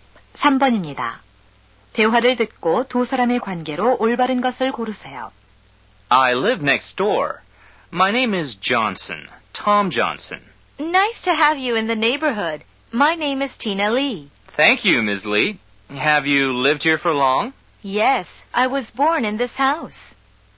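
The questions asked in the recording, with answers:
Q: 대화를 듣고 두 사람의 관계로 올바른 것을 고르세요.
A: 이웃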